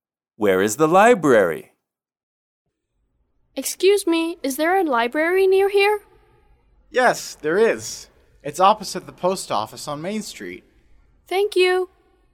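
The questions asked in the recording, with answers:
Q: Where is the library?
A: Opposite the post office on Main Street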